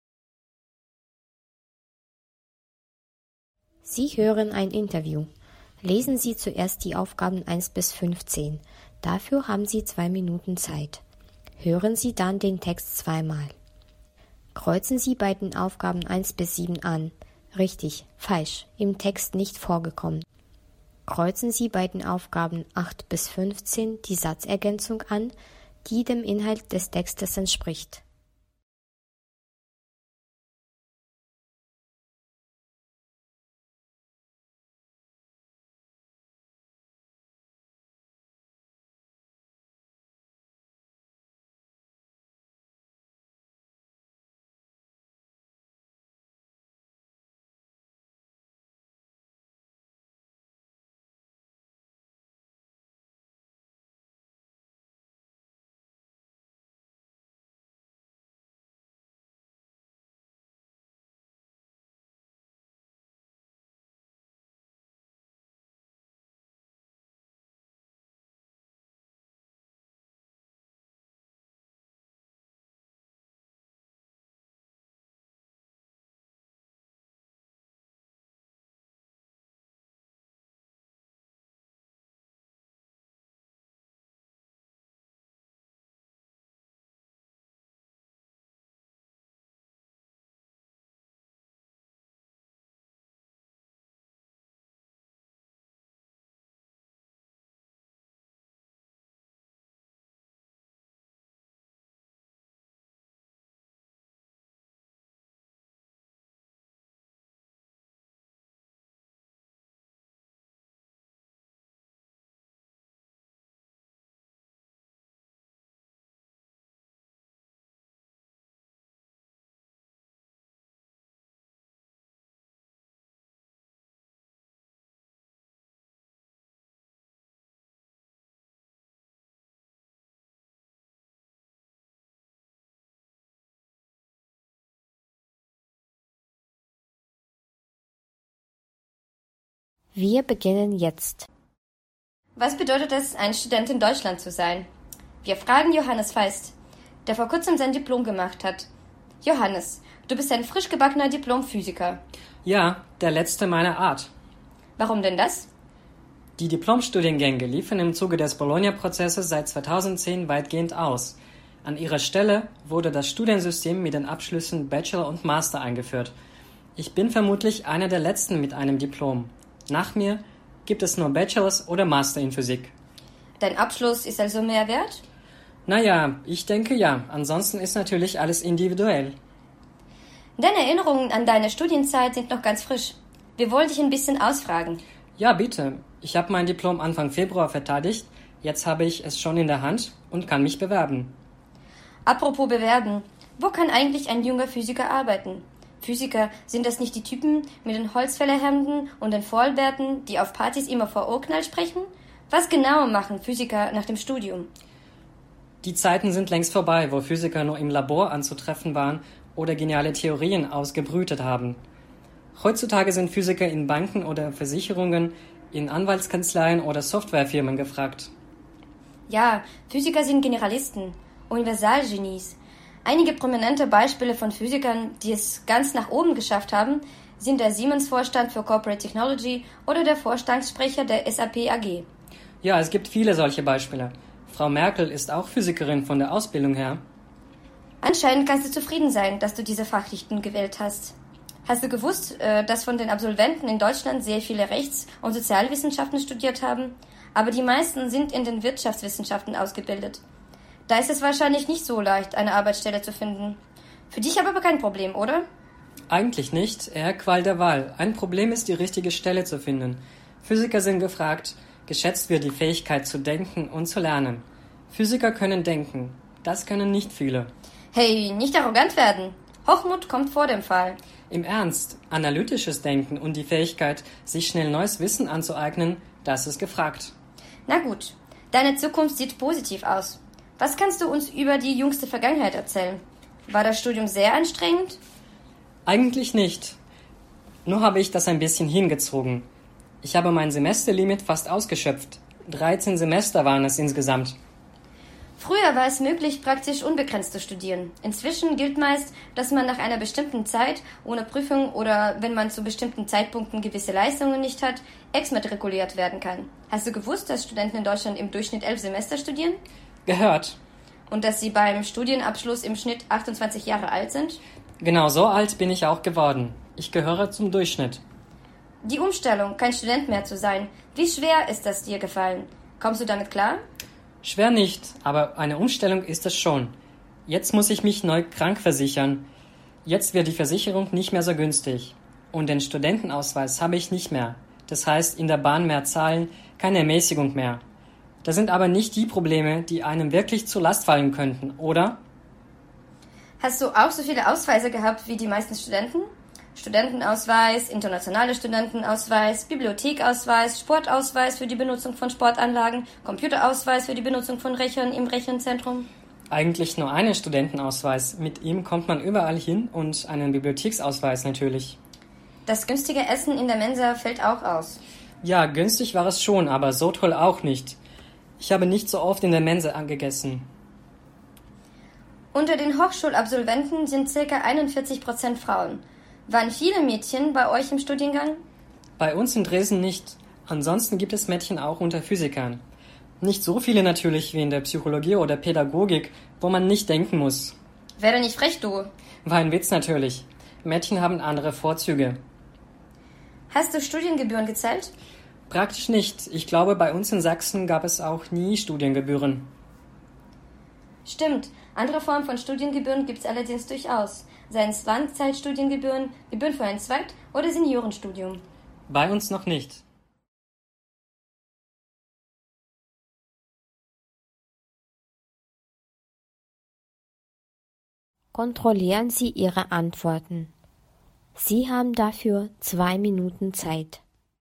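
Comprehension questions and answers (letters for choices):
Kreuzen Sie bei den Aufgaben 1–7 an: Richtig, falsch, im Interview nicht vorgekommen.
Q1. Johannes ist 28 Jahre alt.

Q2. Seit 2009 kann man in Deutschland kein Diplom in Physik mehr machen.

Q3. Johannes trägt wie viele Physiker einen Vollbart.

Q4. Heutzutage arbeiten Physiker auch in Banken und Versicherungen.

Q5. Das Essen in der Studentenmensa findet Johannes nicht teuer.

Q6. Bei der Firma Siemens arbeiten viele Physiker.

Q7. Das Studium fiel Johannes nicht schwer.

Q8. Johannes ist ein ...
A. Physik-Student.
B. Master in Physik.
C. Diplom-Physiker.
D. Bachelor in Physik.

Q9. Was machen Physiker heutzutage in der Arbeitswelt?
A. Sie arbeiten in allen Branchen, wo man denken und sich neues Wissen aneignen muss.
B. Physiker sind überwiegend in Labors und wissenschaftlichen Einrichtungen anzutreffen.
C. Alle kommen schnell ganz hoch und haben leitende Stellen in der Politik und in Konzernen.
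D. Es ist schwer eine passende Arbeitsstelle zu finden, deswegen sind viele Physiker arbeitslos.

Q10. Die meisten Hochschulabsolventen sind in ... ausgebildet.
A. Rechtswissenschaften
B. Sozialwissenschaften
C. Wirtschaftswissenschaften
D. Naturwissenschaften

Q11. Was denkt Johannes über seine Arbeitssuche?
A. Er sieht es als sein einziges Problem, eine für ihn passende Arbeitsstelle auszuwählen.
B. Er befürchtet, dass es ihm schwerfallen wird, überhaupt eine Arbeitsstelle zu bekommen.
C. Er möchte es schnell ganz nach oben schaffen und sieht seine berufliche Zukunft positiv.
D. Er ist frustriert, weil Physik sich nicht als passende Fachrichtung erwiesen hat.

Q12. Wie fühlt sich Johannes jetzt, als er kein Student mehr ist?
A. Es fällt ihm ziemlich schwer, kein Student mehr zu sein.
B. Es ist kein großes Problem für ihn, kein Student mehr zu sein.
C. Es belastet ihn, dass er keine Ermäßigungen mehr haben wird.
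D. Er fürchtet, dass er mit den Versicherungskosten nicht klarkommt.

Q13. Als Student besaß Johannes ...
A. einen internationalen Studentenausweis.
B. einen Studentenausweis und einen Sportausweis.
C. einen Studentenausweis und einen Computerausweis.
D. einen Studentenausweis und einen Bibliotheksausweis.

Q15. Johannes zahlte keine Studiengebühren, weil Studiengebühren in Sachsen ...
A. nur für das Zweitstudium erhoben werden.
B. erst 2016 eingeführt wurden.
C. 2010 abgeschafft wurden.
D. nicht erhoben werden.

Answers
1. Richtig
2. falsch
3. im Interview nicht vorgekommen
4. Richtig
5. Richtig
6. im Interview nicht vorgekommen
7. Richtig
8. C
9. A
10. C
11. A
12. B
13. D
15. D

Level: 8-10 классов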